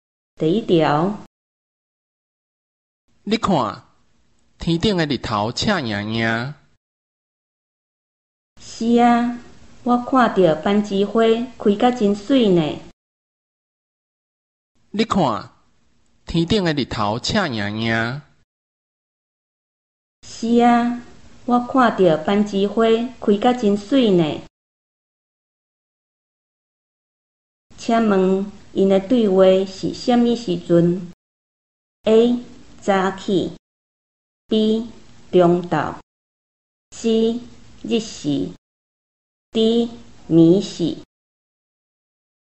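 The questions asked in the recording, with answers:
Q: 请问他们的对话是什么时候?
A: B: 中昼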